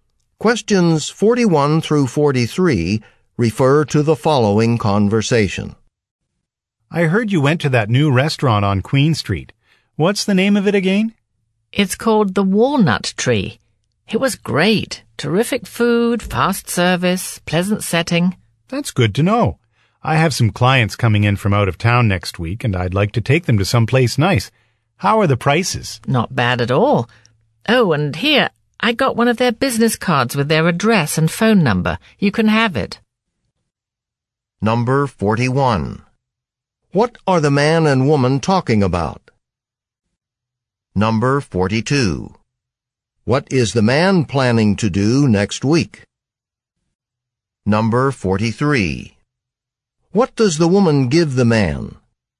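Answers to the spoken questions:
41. A new restaurant (the Walnut Tree)
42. Take out-of-town clients to a nice place
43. The restaurant's business card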